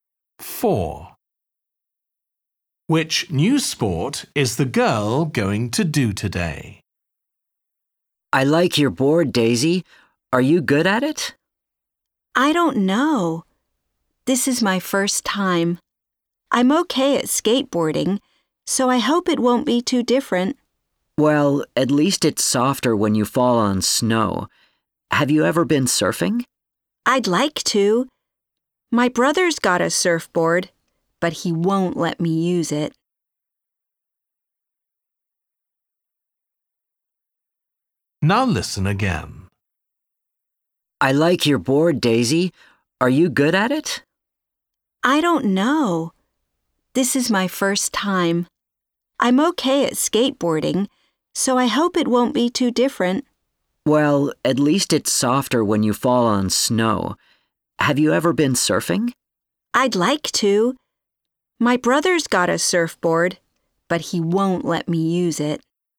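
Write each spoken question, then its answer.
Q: Which new sport is the girl going to do today?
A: Snowboarding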